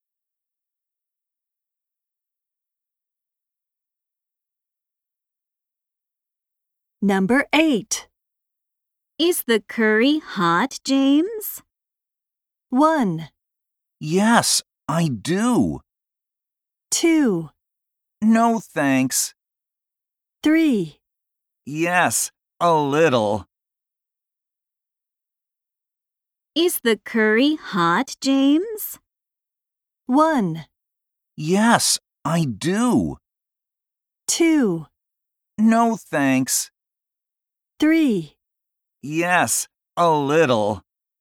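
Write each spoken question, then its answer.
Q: Is the curry hot, James?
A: 3: Yes, a little.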